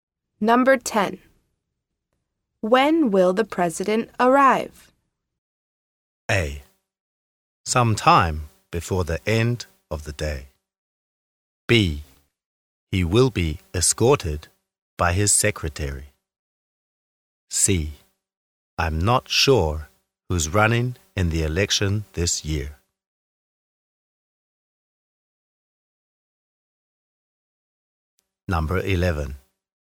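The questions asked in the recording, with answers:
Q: When will the president arrive?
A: A: Sometime before the end of the day.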